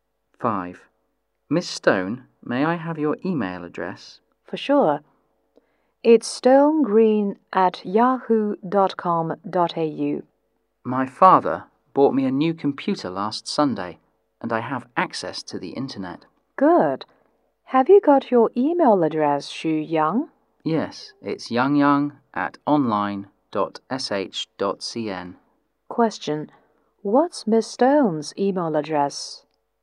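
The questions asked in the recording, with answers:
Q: What's Miss Stone's email address?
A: stonegreen@yahoo.com.au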